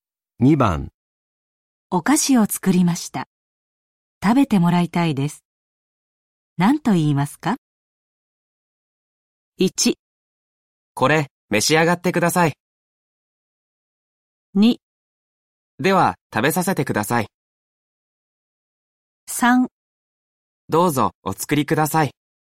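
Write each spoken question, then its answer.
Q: お菓子を作りました。食べてもらいたいです。何と言いますか?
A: 1: これ、召し上がってください。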